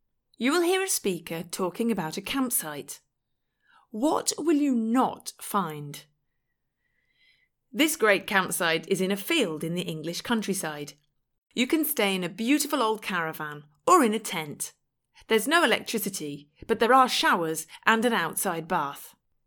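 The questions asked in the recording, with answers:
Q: What will you not find?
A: Electricity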